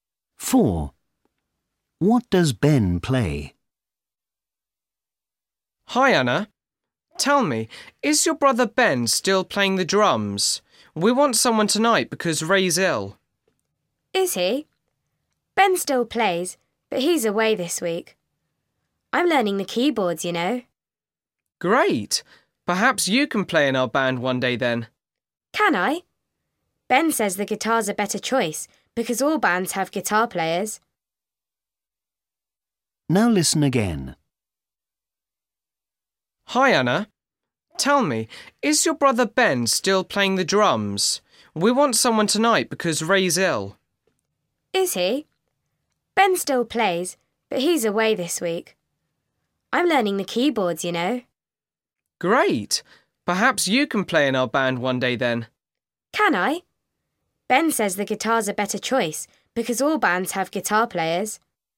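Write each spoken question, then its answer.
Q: What does Ben play?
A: The drums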